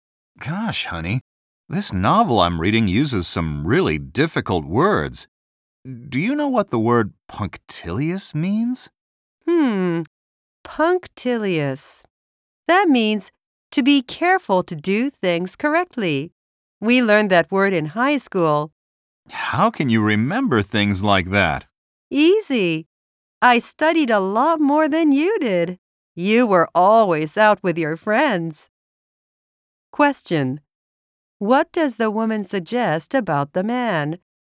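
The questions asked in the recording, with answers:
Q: What does the woman suggest about the man?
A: He didn't study as much as she did in high school; he was always out with his friends.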